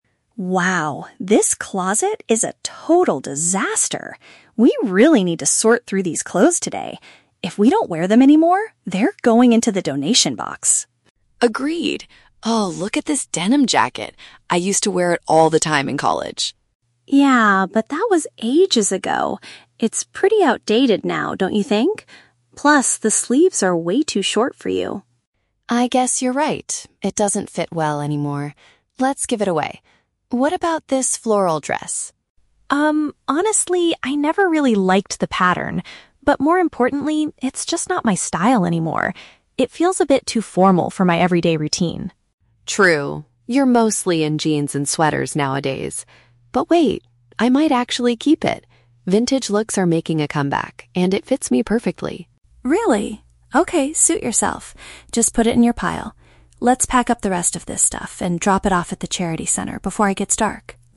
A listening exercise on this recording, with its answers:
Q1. Why does Lily decide to donate the denim jacket?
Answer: It is currently out of fashion and too small for her.

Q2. How does Emma feel about the floral dress?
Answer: She believes the design doesn't match her current lifestyle.

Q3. What will finally happen to the floral dress?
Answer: Lily will save it because it is trendy again.

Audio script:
Emma: Wow, this closet is a total disaster. We really need to sort through these clothes today. If we don't wear them anymore, they're going into the donation box.
Lily: Agreed. Oh, look at this denim jacket! I used to wear it all the time in college.
Emma: Yeah, but that was ages ago. It's pretty outdated now, don't you think? Plus, the sleeves are way too short for you.
Lily: I guess you're right. It doesn't fit well anymore. Let's give it away. What about this floral dress?
Emma: Um, honestly, I never really liked the pattern. But more importantly, it's just not my style anymore. It feels a bit too formal for my everyday routine.
Lily: True. You're mostly in jeans and sweaters nowadays. But wait, I might actually keep it. Vintage looks are making a comeback, and it fits me perfectly.
Emma: Really? Okay, suit yourself. Just put it in your pile. Let's pack up the rest of this stuff and drop it off at the charity center before it gets dark.